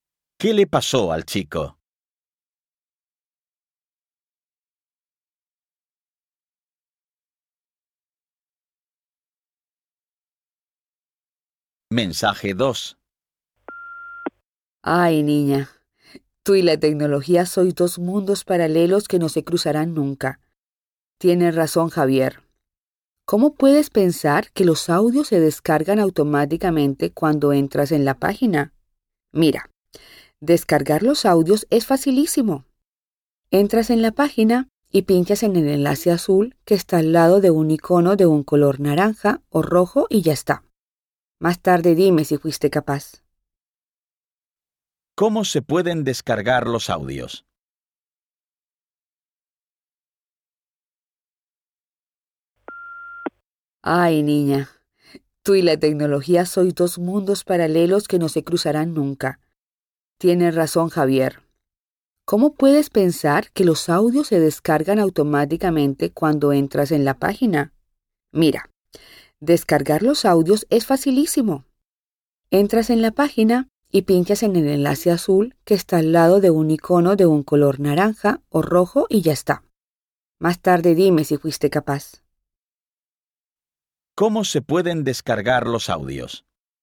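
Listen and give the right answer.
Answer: Pinchando en el enlace azul junto al icono naranja o rojo.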